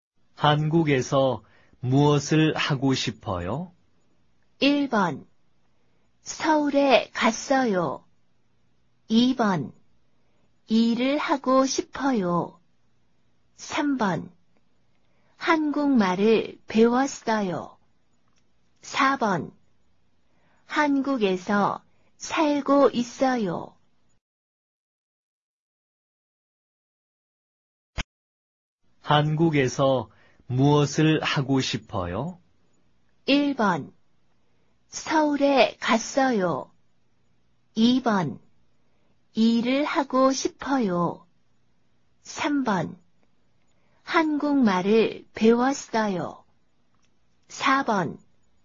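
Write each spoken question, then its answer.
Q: 한국에서 무엇을 하고 싶어요?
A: 2: 일을 하고 싶어요.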